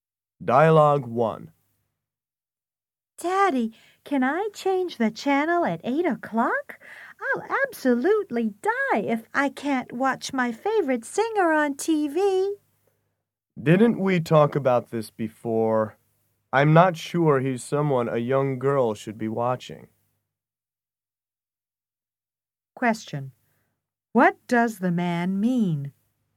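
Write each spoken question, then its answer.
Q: What does the man mean?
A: He doesn't think his daughter should watch that singer.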